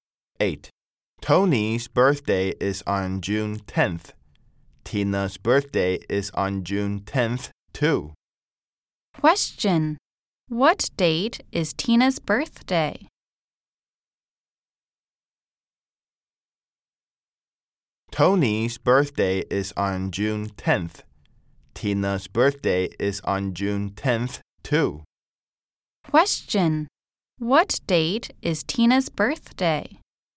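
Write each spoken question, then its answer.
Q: Question. What date is Tina's birthday?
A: June 10th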